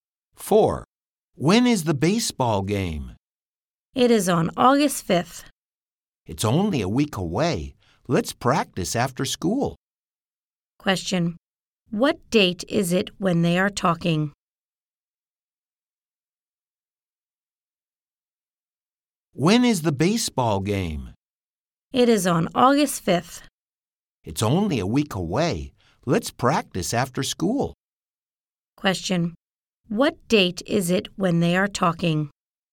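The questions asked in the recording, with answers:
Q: What date is it when they are talking?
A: July 29th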